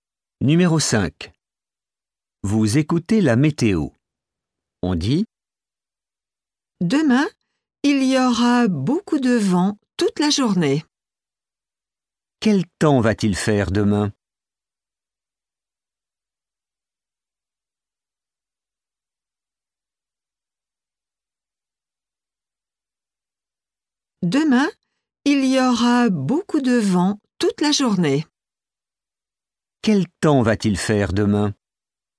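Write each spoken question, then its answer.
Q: Quel temps va-t-il faire demain?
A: Beaucoup de vent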